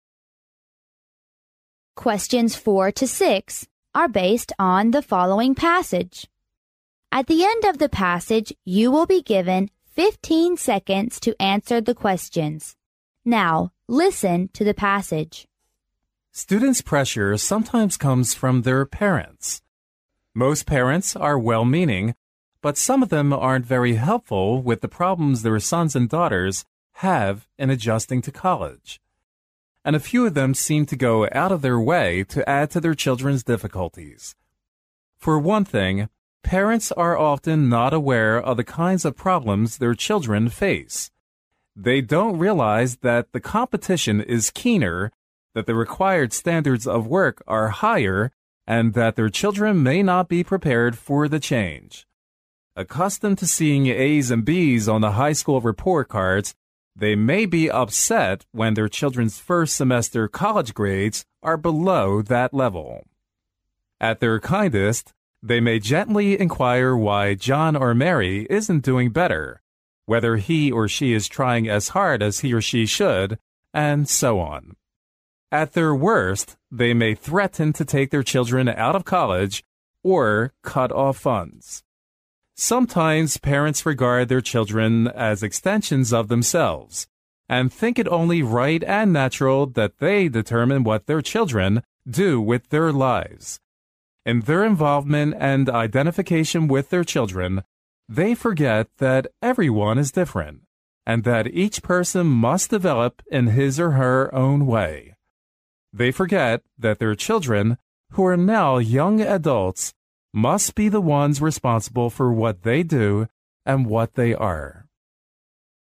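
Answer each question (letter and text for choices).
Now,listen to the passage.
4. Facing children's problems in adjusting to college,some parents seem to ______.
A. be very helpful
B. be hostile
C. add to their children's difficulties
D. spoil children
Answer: C. add to their children's difficulties

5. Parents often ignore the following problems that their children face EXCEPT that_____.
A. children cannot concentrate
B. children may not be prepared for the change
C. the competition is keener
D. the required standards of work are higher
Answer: A. children cannot concentrate

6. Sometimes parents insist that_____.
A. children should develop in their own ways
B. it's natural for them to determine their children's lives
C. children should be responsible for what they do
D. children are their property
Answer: B. it's natural for them to determine their children's lives

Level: 英语四级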